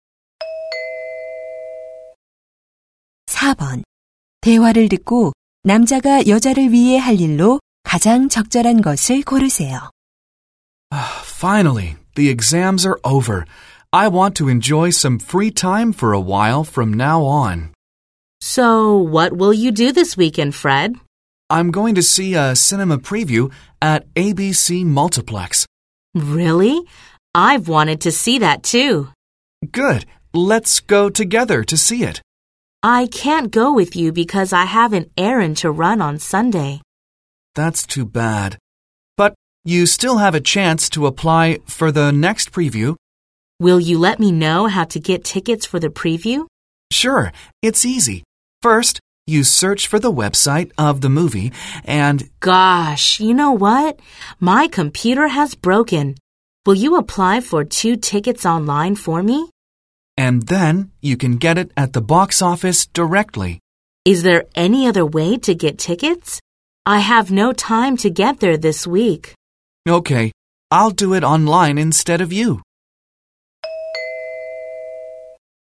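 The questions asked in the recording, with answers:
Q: 대화를 듣고 남자가 여자를 위해 할 일로 가장 적절한 것을 고르세요.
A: 온라인으로 시사회 표 2장 신청하기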